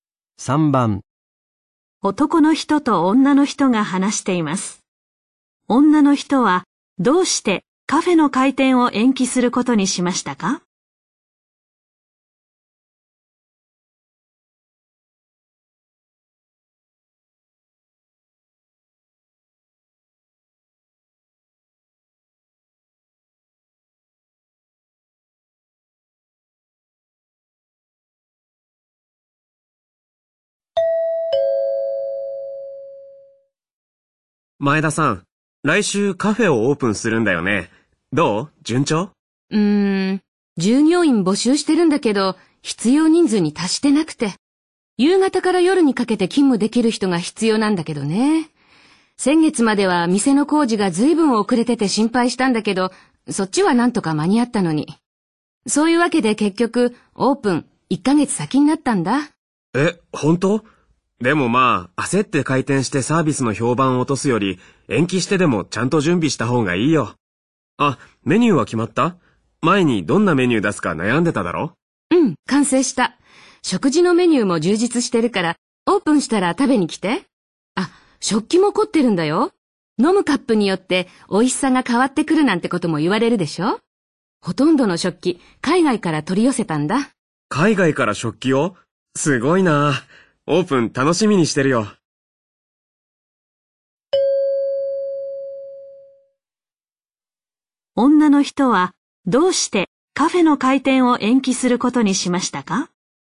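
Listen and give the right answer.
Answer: 従業員が必要人数に達していないから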